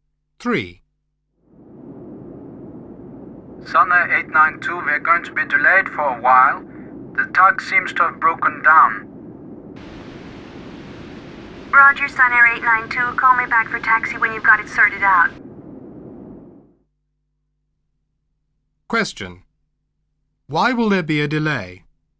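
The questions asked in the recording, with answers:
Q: Why will there be a delay?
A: The tug seems to have broken down.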